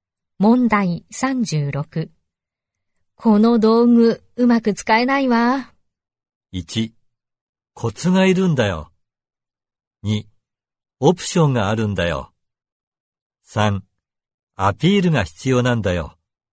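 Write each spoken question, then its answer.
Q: この道具、うまく使えないわ。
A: 1: コツがいるんだよ。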